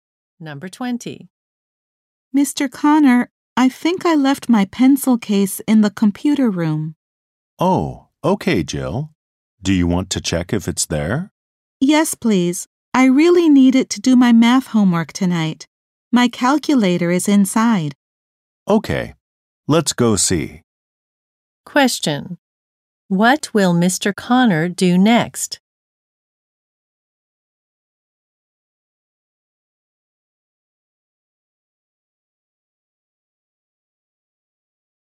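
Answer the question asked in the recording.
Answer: Go with Jill to the computer room to look for her pencil case.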